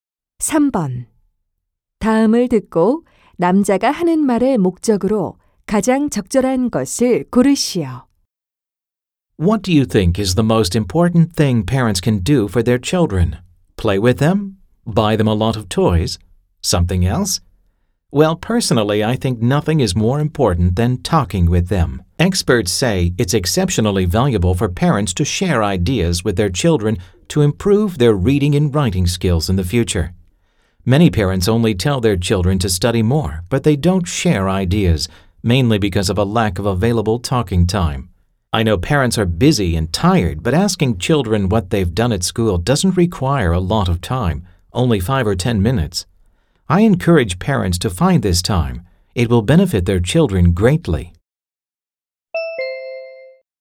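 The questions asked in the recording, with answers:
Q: 다음을 듣고 남자가 하는 말의 목적으로 가장 적절한 것을 고르시오.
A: 부모에게 자녀와 대화할 시간을 갖도록 권장하려고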